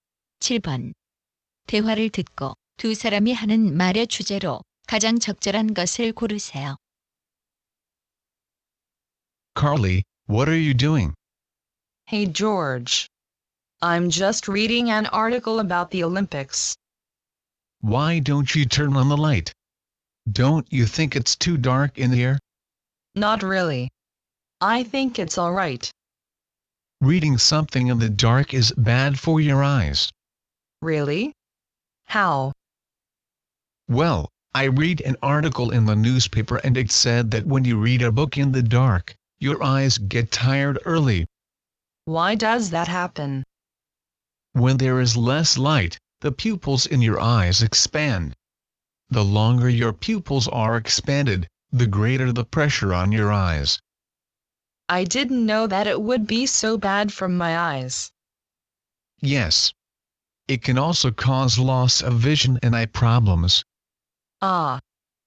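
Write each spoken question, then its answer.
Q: 대화를 듣고 두 사람이 하는 말의 주제로 가장 적절한 것을 고르세요.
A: 어두운 곳에서 책을 읽는 것이 눈에 해로운 이유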